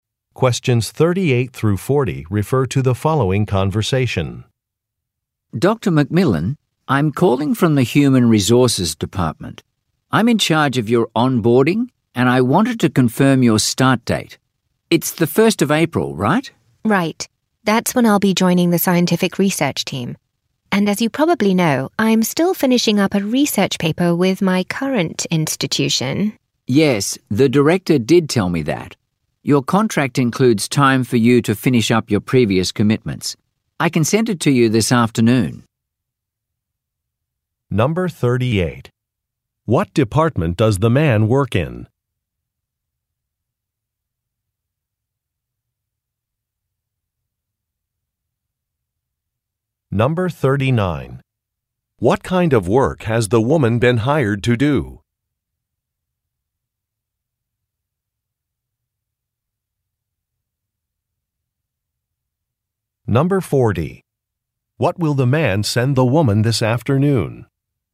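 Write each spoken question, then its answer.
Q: What department does the man work in?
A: Human Resources

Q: What kind of work has the woman been hired to do?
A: Scientific research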